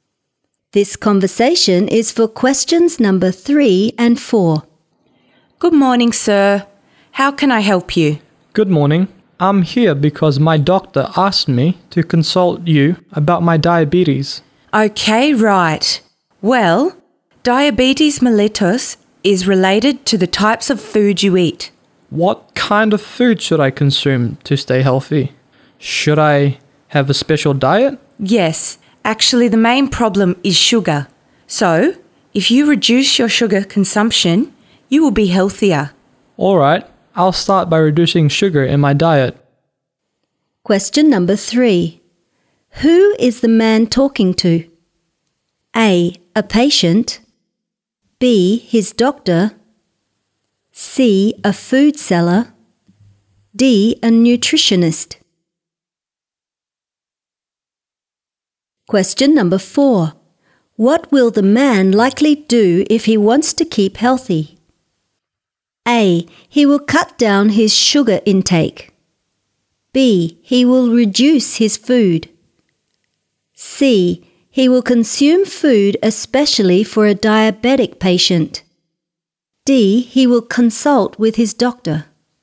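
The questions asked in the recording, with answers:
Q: Who is the man talking to?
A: D: A nutritionist.

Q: What will the man likely do if he wants to keep healthy?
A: A: He will cut down his sugar intake.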